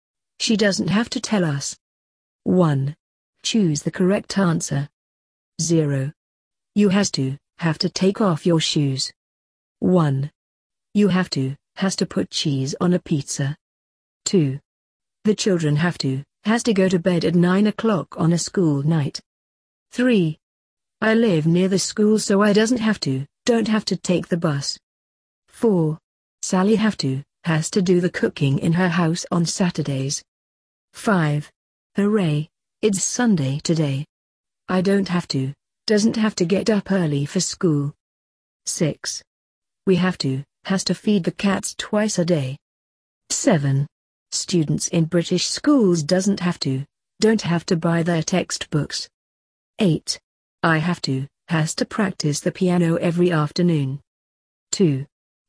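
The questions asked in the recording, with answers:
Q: The children have to, has to go to bed at 9 o'clock on a school night.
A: have to

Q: I live near the school so I doesn't have to, don't have to take the bus.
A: don't have to

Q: Sally have to, has to do the cooking in her house on Saturdays.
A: has to

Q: I don't have to, doesn't have to get up early for school.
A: don't have to

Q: We have to, has to feed the cats twice a day.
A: have to

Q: Students in British schools doesn't have to, don't have to buy their textbooks.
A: don't have to

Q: I have to, has to practice the piano every afternoon.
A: have to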